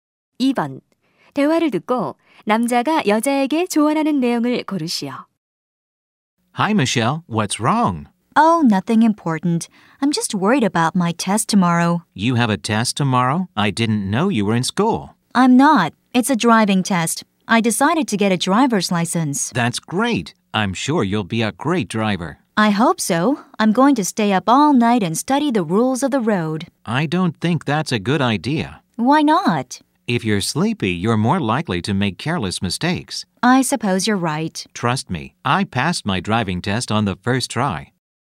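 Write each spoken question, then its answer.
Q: 대화를 듣고 남자가 여자에게 조언하는 내용을 고르시오.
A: 밤을 새우지 말고 잠을 자라 (졸리면 실수하기 쉽다)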